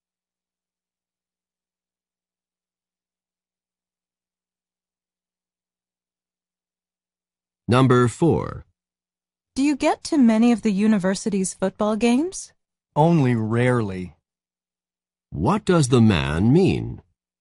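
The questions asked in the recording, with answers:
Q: What does the man mean?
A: He seldom goes to the games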